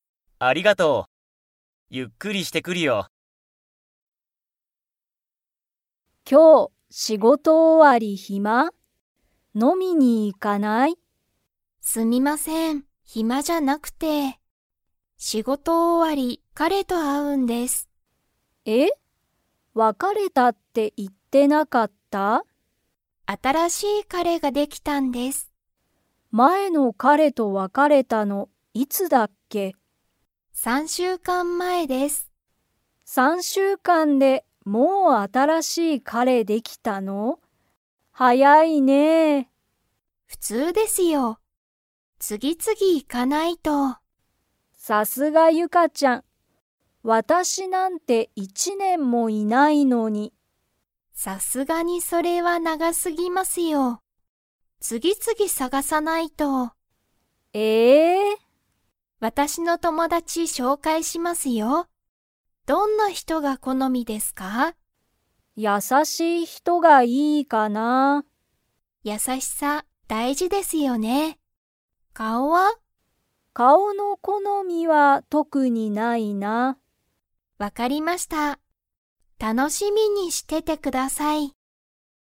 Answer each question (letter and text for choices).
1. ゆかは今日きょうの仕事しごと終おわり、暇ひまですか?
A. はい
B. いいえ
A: B. いいえ

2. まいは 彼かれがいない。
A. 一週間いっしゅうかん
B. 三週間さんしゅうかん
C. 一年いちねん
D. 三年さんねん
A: C. 一年いちねん

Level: Level 4